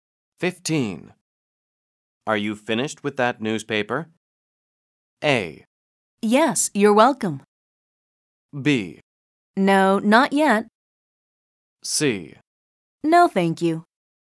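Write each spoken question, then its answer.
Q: Are you finished with that newspaper?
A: B: No, not yet.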